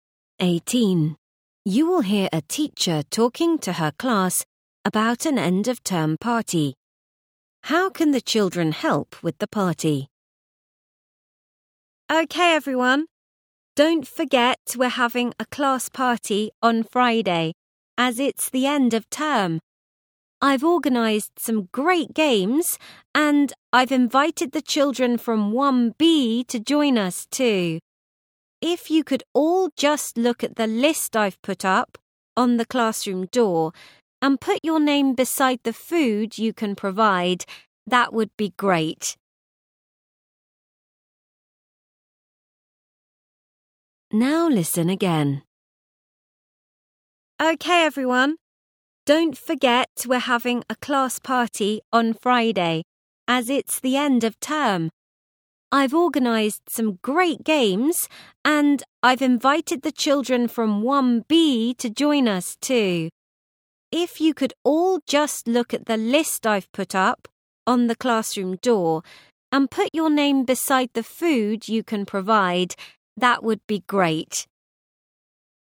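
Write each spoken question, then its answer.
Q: How can the children help with the party?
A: By bringing food.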